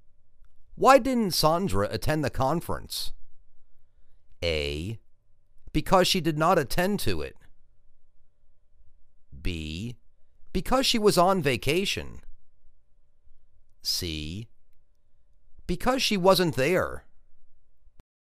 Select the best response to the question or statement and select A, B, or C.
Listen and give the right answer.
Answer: Because she was on vacation.